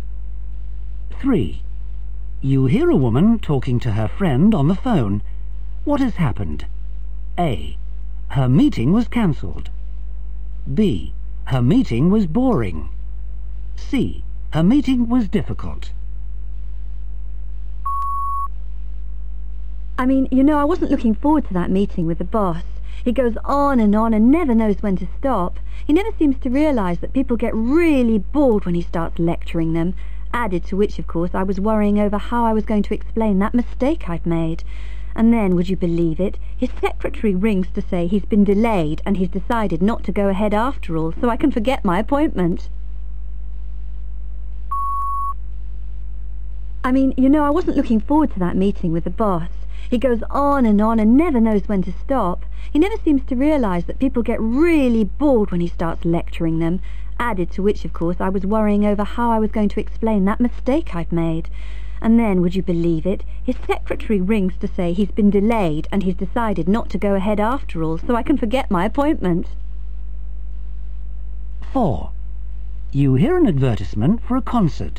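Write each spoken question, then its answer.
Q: What has happened?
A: A: Her meeting was cancelled.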